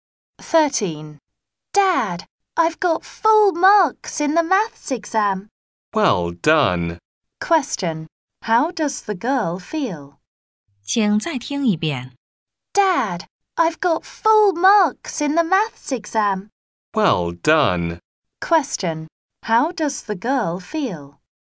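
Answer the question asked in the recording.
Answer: Happy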